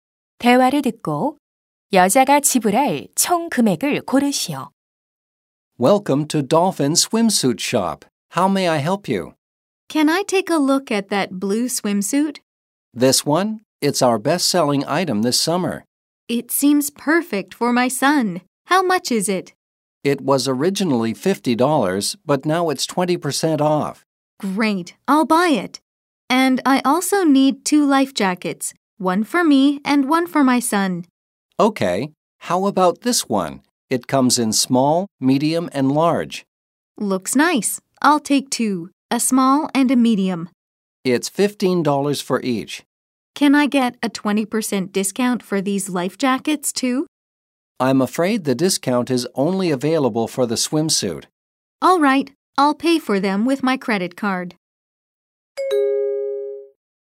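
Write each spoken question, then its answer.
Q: 대화를 듣고 여자가 지불할 총 금액을 고르시오.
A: $70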